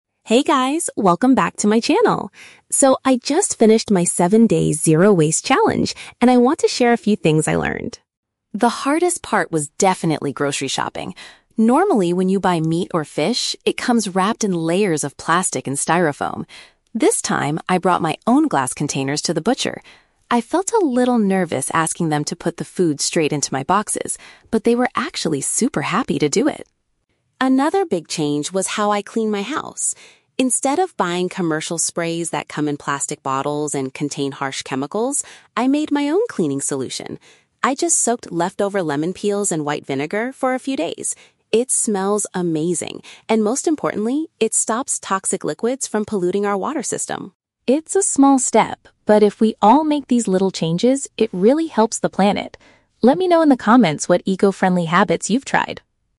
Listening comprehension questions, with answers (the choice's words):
Listen to a lifestyle vlogger talking about her eco-friendly challenge and choose the correct answer (A, B, or C) for each question.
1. What did the vlogger do differently when buying meat and fish?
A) She bought them from a supermarket that uses styrofoam trays.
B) She asked the shop assistant to use her personal glass boxes.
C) She decided to stop eating animal products for the entire week.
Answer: She asked the shop assistant to use her personal glass boxes.

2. How did the vlogger change her house cleaning routine?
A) She purchased a commercial spray in a recycled plastic bottle.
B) She hired a professional cleaning service that uses green products.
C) She created a natural mixture using fruit waste and vinegar.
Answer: She created a natural mixture using fruit waste and vinegar.

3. According to the vlogger, what is the main environmental benefit of her new cleaning liquid?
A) It leaves a much better scent in the house than store-bought sprays.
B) It prevents dangerous substances from entering the water supply.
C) It significantly reduces the amount of food waste in the local landfill.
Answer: It prevents dangerous substances from entering the water supply.

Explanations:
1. The vlogger says she "brought my own glass containers" and asked them to "put the food straight into my boxes." (Paraphrasing: personal glass boxes = my own glass containers). Why the trap is wrong: Option (A) is the trap. She mentions that meat normally comes wrapped in "plastic and styrofoam," but this is her old habit that she is trying to avoid, not what she did differently this time. Option (C) is a plausible eco-friendly action, but it is not mentioned.
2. She made her own cleaning solution by soaking "leftover lemon peels in white vinegar." (Paraphrasing: fruit waste = leftover lemon peels; created a natural mixture = made my own cleaning solution). Why the trap is wrong: Option (A) is a strong trap. She mentions "commercial sprays" and "plastic bottles," but she explicitly says "Instead of buying" them (she stopped buying them). Option (B) is unmentioned.
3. She points out that her homemade cleaner "stops toxic liquids from polluting our water system." (Paraphrasing: prevents = stops; dangerous substances = toxic liquids; water supply = water system). Why the trap is wrong: Option (A) is a trap. She does say that her cleaner "smells amazing," but a nice smell is a personal benefit, not an environmental benefit. Option (C) is a trap; while using lemon peels reduces food waste, she does not mention the landfill as the main environmental reason for doing this.

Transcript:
Vlogger: Hey guys, welcome back to my channel! So, I just finished my 7-day Zero Waste Challenge, and I want to share a few things I learned.
The hardest part was definitely grocery shopping. Normally, when you buy meat or fish, it comes wrapped in layers of plastic and styrofoam. This time, I brought my own glass containers to the butcher. I felt a little nervous asking them to put the food straight into my boxes, but they were actually super happy to do it!
Another big change was how I clean my house. Instead of buying commercial sprays that come in plastic bottles and contain harsh chemicals, I made my own cleaning solution. I just soaked leftover lemon peels in white vinegar for a few days. It smells amazing, and most importantly, it stops toxic liquids from polluting our water system.
It's a small step, but if we all make these little changes, it really helps the planet. Let me know in the comments what eco-friendly habits you've tried!